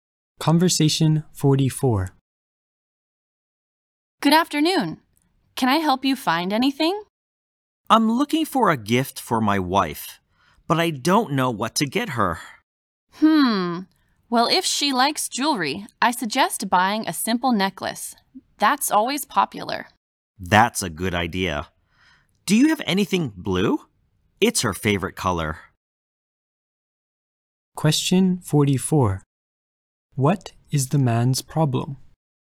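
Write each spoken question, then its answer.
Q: What is the man's problem?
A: He doesn't know what gift to get his wife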